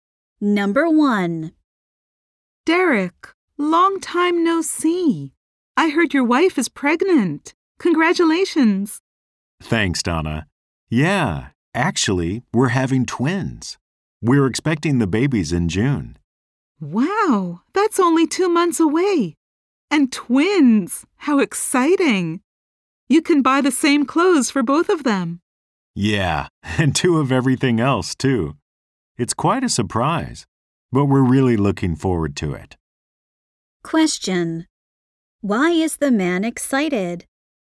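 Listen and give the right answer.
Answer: He and his wife are having twins.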